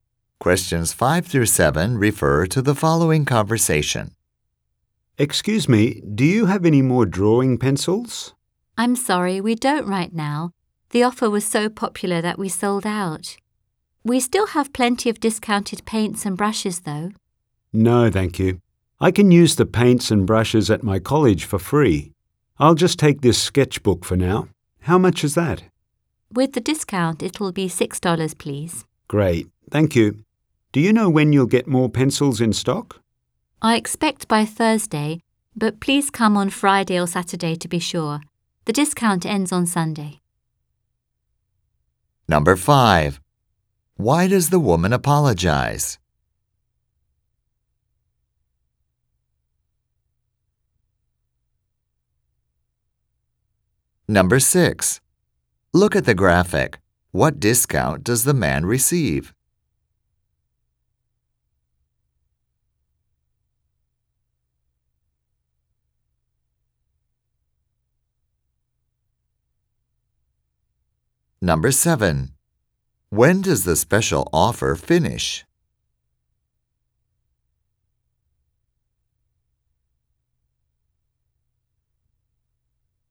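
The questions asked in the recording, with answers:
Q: Why does the woman apologize?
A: The drawing pencils are sold out

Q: When does the special offer finish?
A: On Sunday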